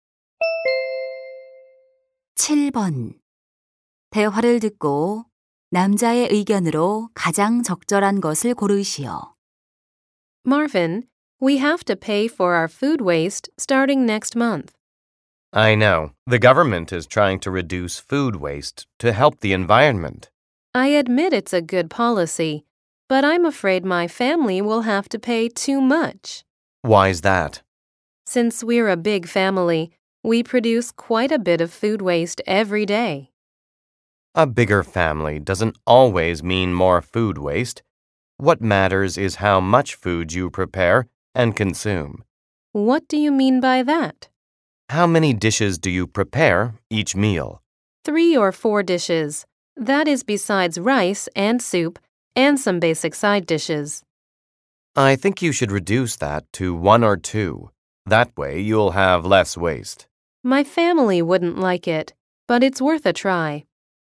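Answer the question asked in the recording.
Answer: 음식물 쓰레기를 줄이려면 준비하는 요리의 가짓수를 줄여야 한다.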